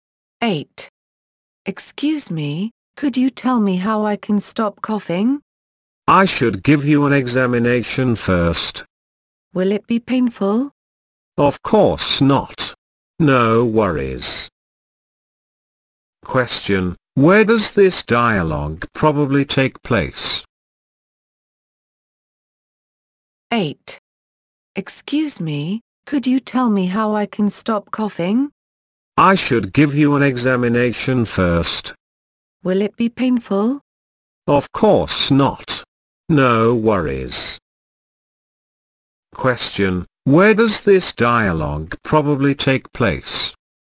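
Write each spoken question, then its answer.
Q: Question, where does this dialogue probably take place?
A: In a hospital (at a doctor's)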